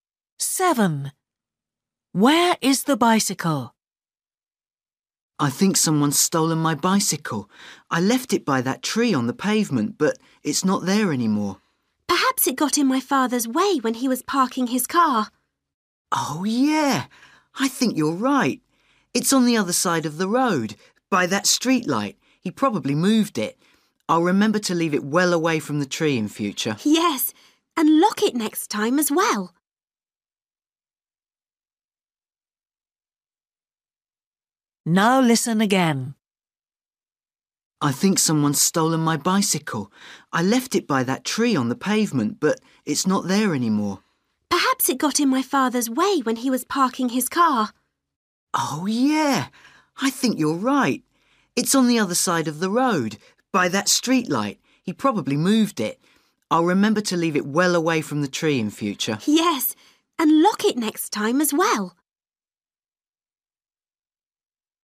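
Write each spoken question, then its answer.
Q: Where is the bicycle?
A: On the other side of the road, by the streetlight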